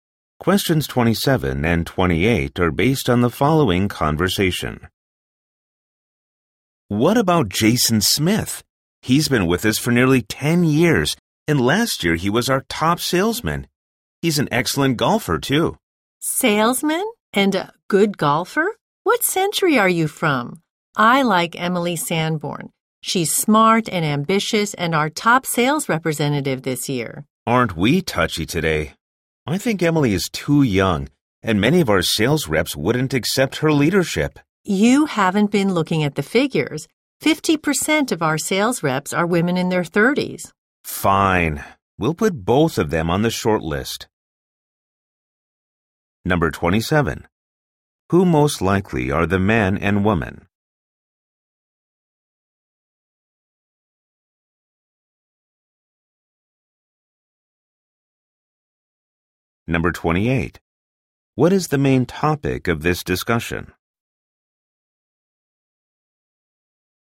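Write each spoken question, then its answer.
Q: What is the main topic of this discussion?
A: Choosing a new sales team leader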